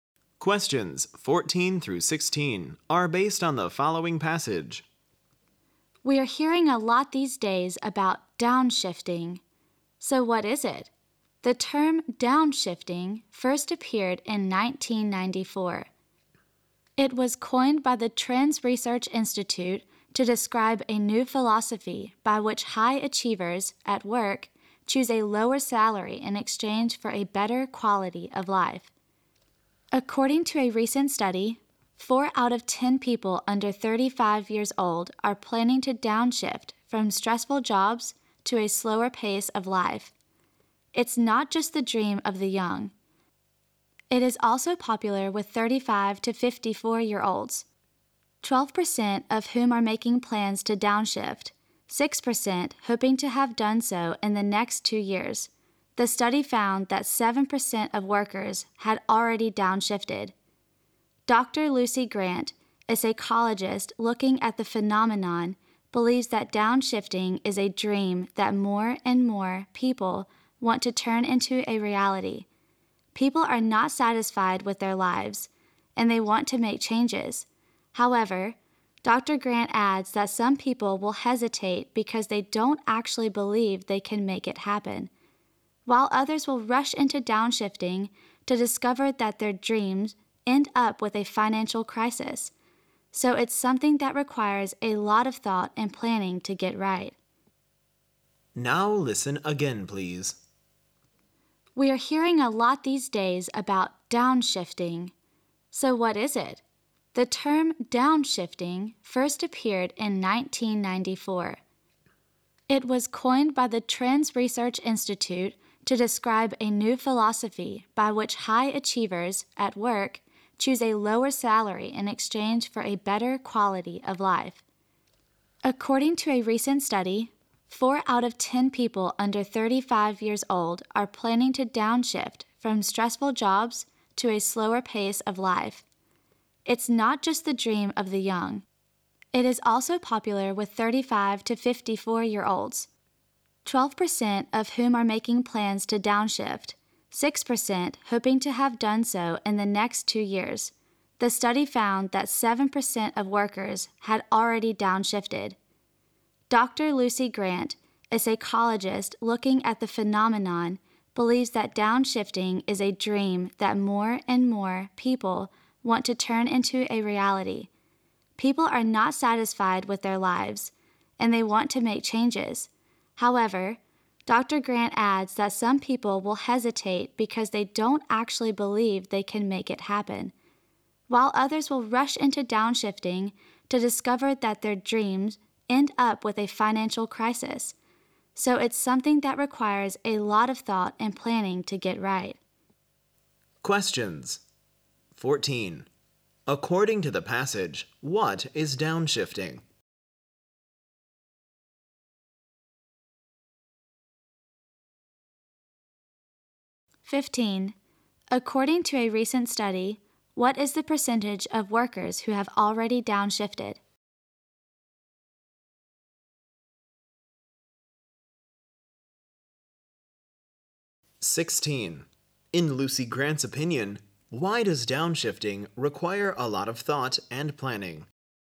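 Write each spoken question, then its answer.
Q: According to the passage, what is downshifting?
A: Choosing a lower salary for a better quality of life

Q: In Lucy Grant's opinion, why does downshifting require a lot of thought and planning?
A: Some people hesitate, and others who rush into it may face a financial crisis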